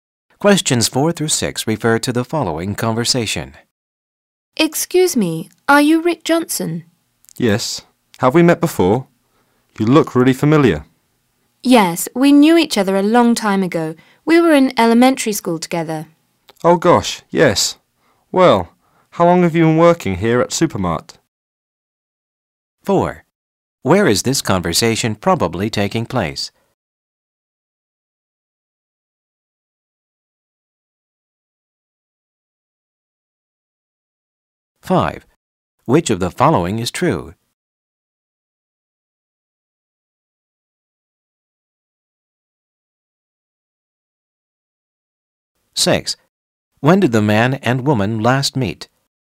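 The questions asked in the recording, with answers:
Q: Where is this conversation probably taking place?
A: At Supermart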